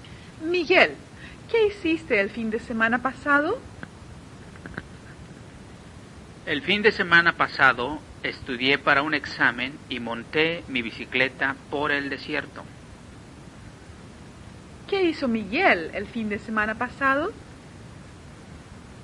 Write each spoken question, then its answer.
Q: ¿Qué hizo Miguel el fin de semana pasado?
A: Miguel estudió para un examen y montó su bicicleta por el desierto.